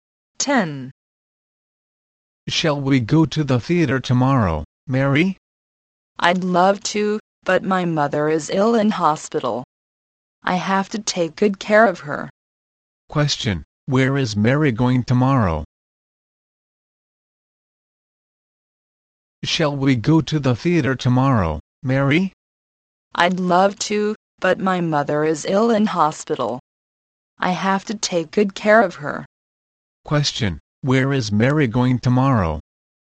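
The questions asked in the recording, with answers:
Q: Question: Where is Mary going tomorrow?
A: To the hospital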